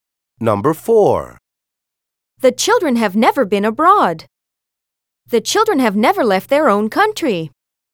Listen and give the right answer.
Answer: Same is the correct answer.